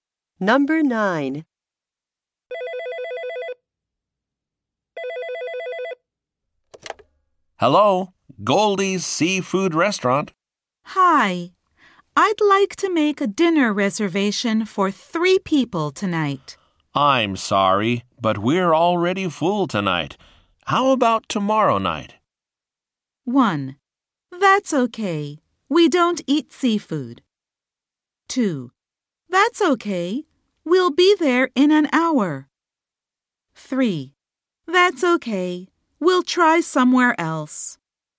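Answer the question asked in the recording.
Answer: 3: That's okay. We'll try somewhere else.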